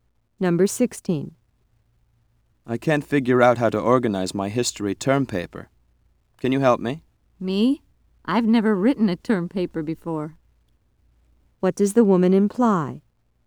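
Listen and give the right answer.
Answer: She can't help him because she's never written a term paper.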